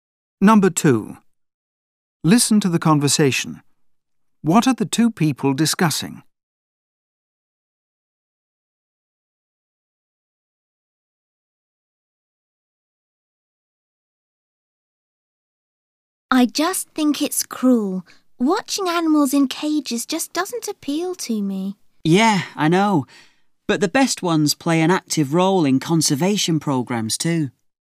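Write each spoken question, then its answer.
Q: What are the two people discussing?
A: Zoos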